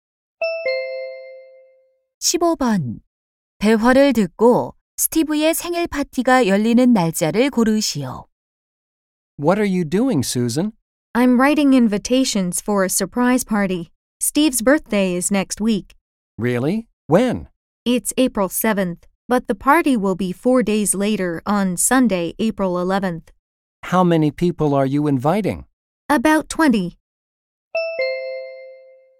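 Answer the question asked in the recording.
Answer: 4월 11일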